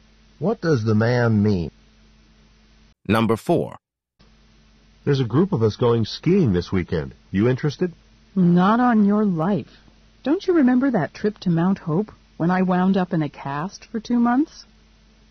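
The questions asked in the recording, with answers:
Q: What does the woman imply?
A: She won't go skiing because she was injured on a previous ski trip.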